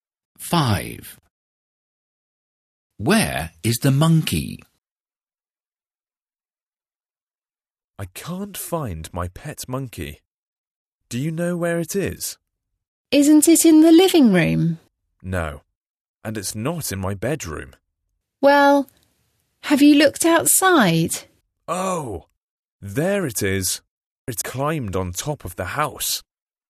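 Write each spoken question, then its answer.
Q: Where is the monkey?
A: On top of the house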